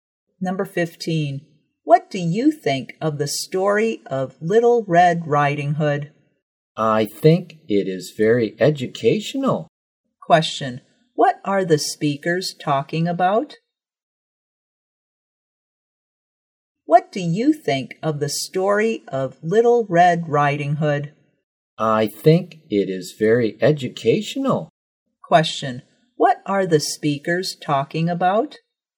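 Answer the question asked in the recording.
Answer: The story of Little Red Riding Hood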